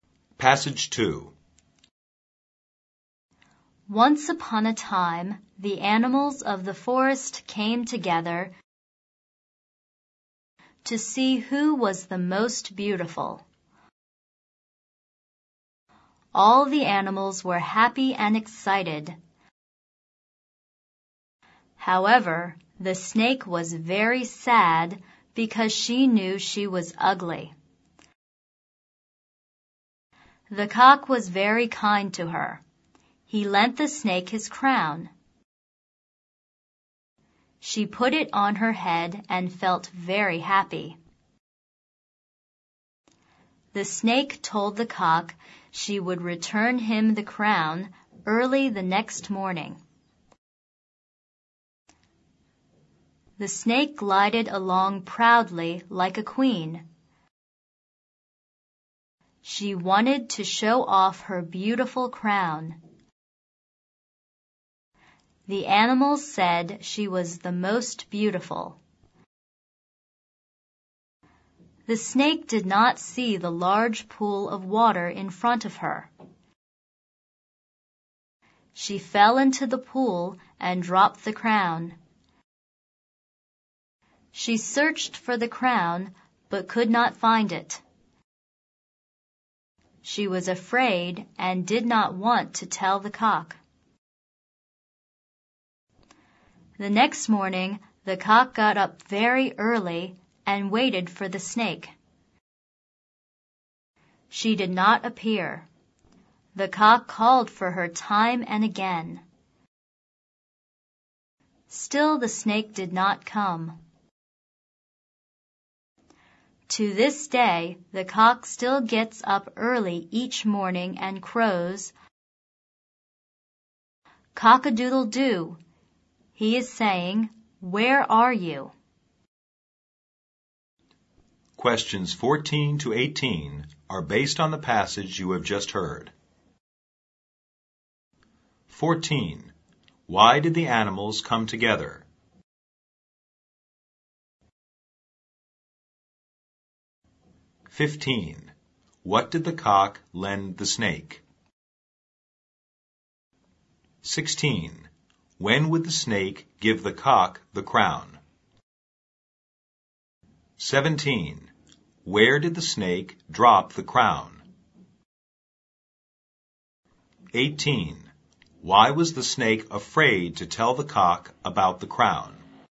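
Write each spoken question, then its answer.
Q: Why did the animals come together?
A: To see who was the most beautiful

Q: What did the cock lend the snake?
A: His crown

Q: When would the snake give the cock the crown?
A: Early the next morning

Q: Where did the snake drop the crown?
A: In a large pool of water

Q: Why was the snake afraid to tell the cock about the crown?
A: Because she had lost the crown and could not find it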